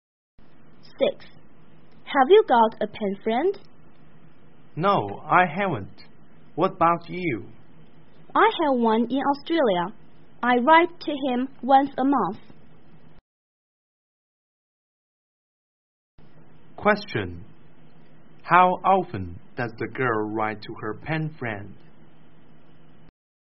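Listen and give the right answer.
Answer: Once a month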